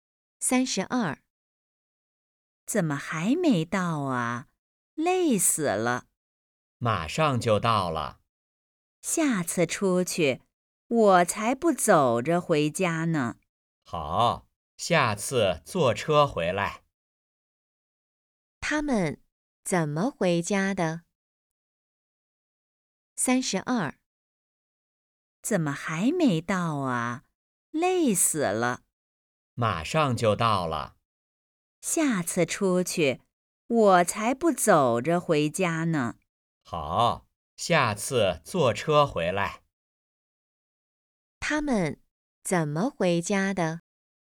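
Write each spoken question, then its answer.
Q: 他们怎么回家的?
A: 走着回家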